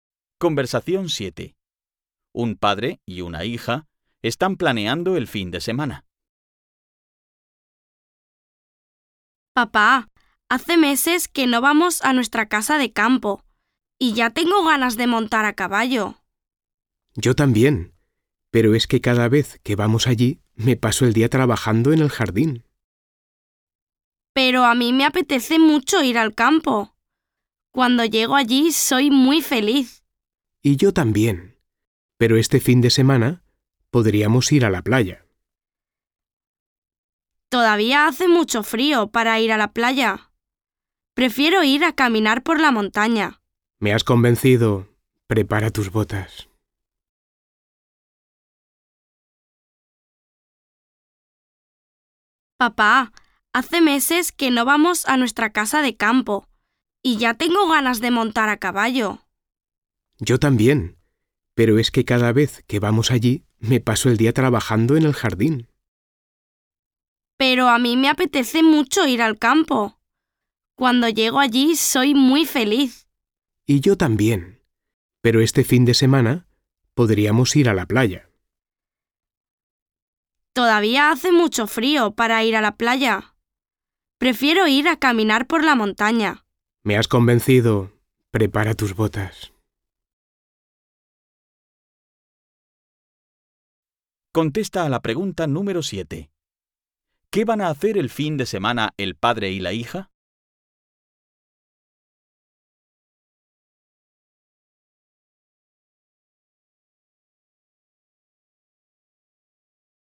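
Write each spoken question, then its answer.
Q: ¿Qué van a hacer el fin de semana el padre y la hija?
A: Caminar por la montaña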